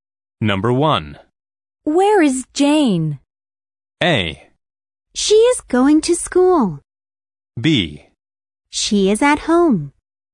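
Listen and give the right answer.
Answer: B: She is at home.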